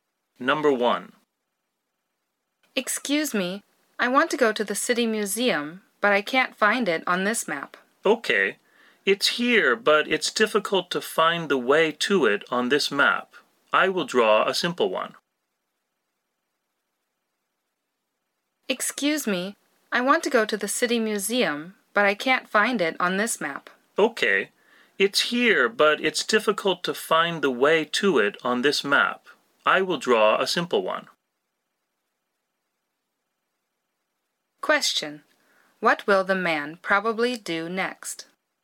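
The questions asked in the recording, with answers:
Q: What will the man probably do next?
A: Draw a simple map to the City Museum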